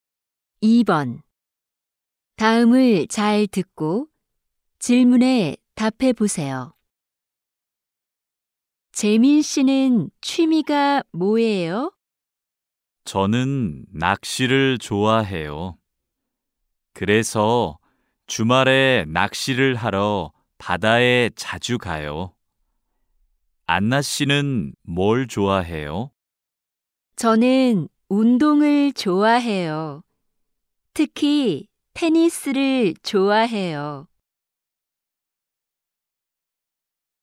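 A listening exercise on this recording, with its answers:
[4-1~4-3] 다음을 잘 듣고 질문에 답해 보세요.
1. 안나 씨의 취미가 뭐예요?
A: 운동 (테니스)

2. 재민 씨의 취미가 뭐예요?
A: 낚시

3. 재민 씨는 주말에 보통 어디에 가요?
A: 바다

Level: 1B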